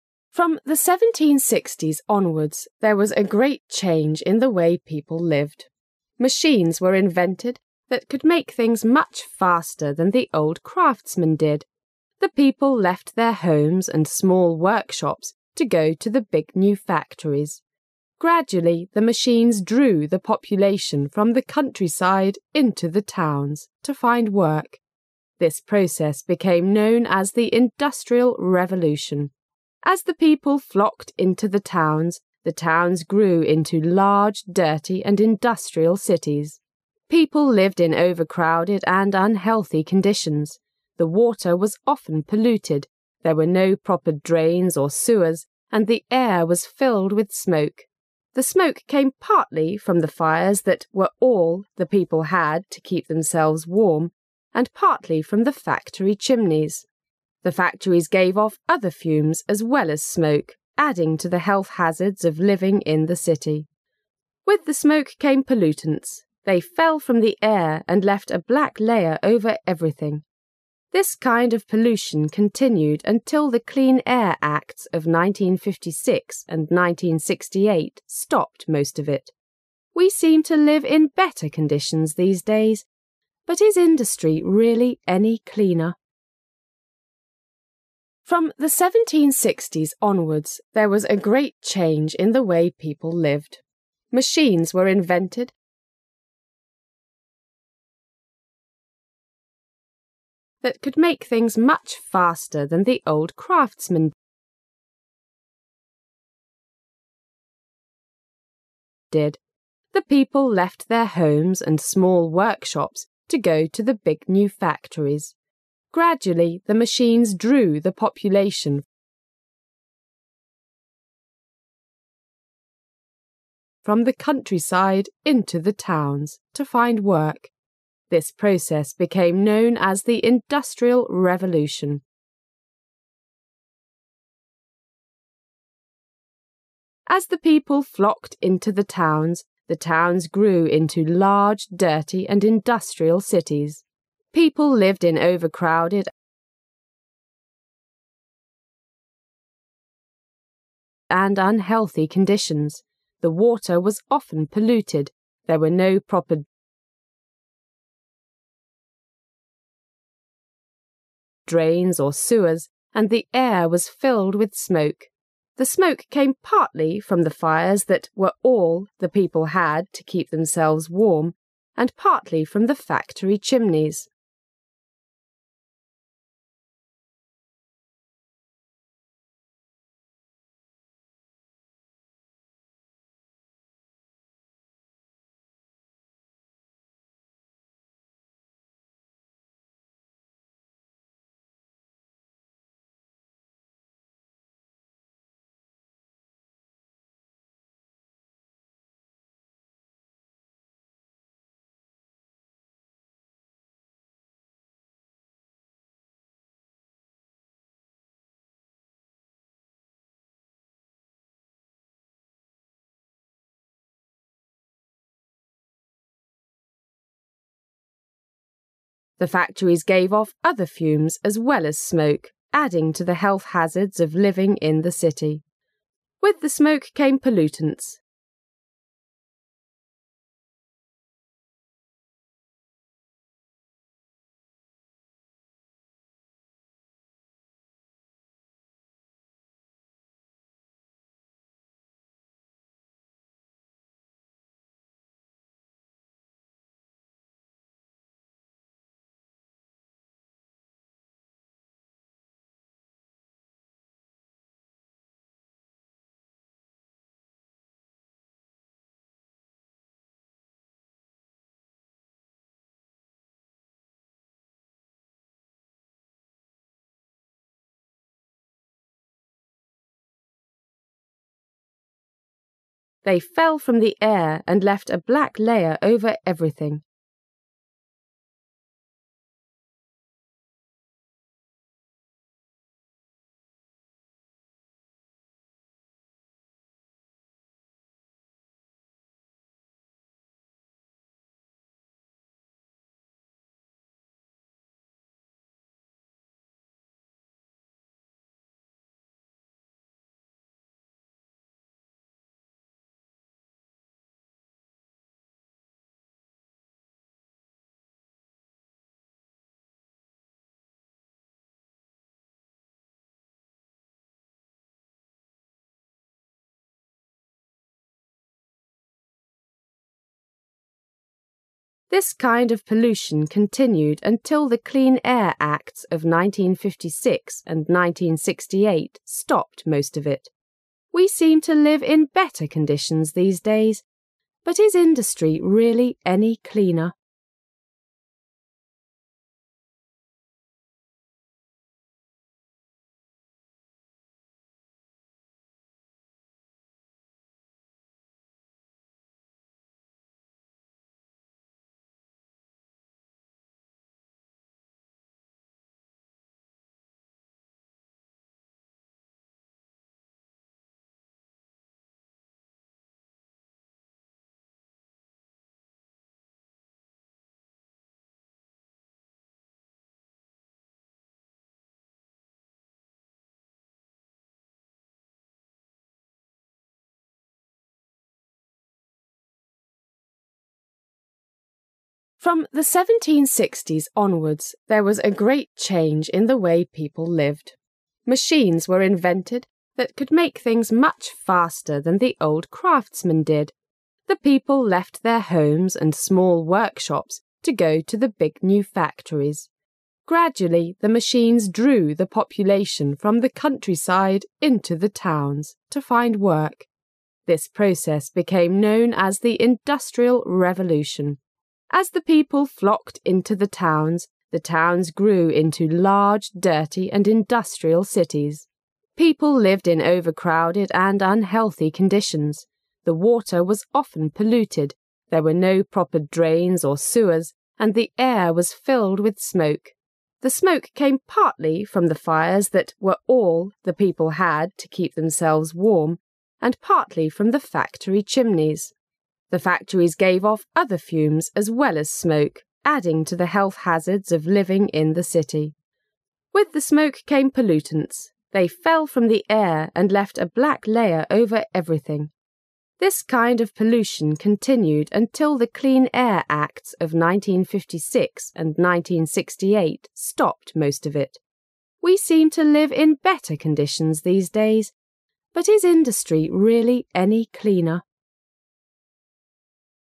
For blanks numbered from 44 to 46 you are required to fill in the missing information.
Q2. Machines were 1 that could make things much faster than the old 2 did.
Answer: craftsman

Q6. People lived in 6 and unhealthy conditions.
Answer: overcrowded

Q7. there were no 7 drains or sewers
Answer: proper

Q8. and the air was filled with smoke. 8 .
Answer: The smoke came partly from the fires all the people had to keep themselves warm and partly from the factory chimneys.

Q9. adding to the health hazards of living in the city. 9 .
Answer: With the smoke came pollutants

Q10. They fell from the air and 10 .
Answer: left a black layer over everything

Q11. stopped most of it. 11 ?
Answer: We seem to live in better conditions these days, but is industry really any cleaner?

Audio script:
[解析] 36-46 From 1760s onwards, there was a great change in the way people lived. Machines were invented that could make things much faster than the old craftsman did. The people left their homes and small workshops to go to the big new factories. Gradually the machines drew the population from the countryside into the towns to find work. This process became known as the Industrial Revolution. As the people flocked into the towns, the towns grew into large, dirty and industrial cities. People lived in overcrowded and unhealthy conditions. The water was often polluted, there were no proper drains or sewers, and the air was filled with smoke. The smoke came partly from the fires that was all the people had to keep themselves warm and partly from the factory chimneys. The factories gave off other fumes as well as smoke, adding to the health hazards of living in the city. With the smoke came pollutants. They fell from the air and left a black layer over everything. This kind of pollution continued until the Clean Air Acts of 1956 and 1968 stopped most of it.
We seem to live in better conditions these days, but is industry really any cleaner?